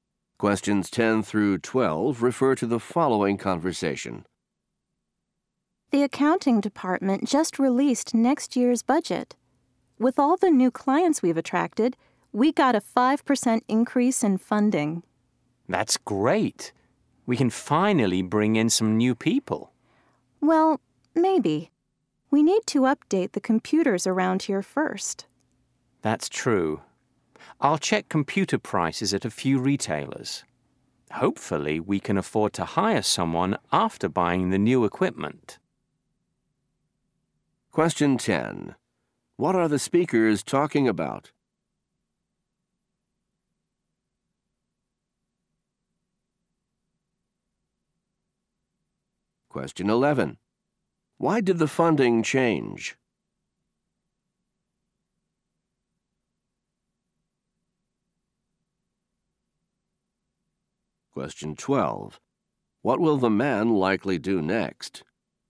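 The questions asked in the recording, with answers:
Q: What are the speakers talking about?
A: Next year's budget

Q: Why did the funding change?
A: They attracted new clients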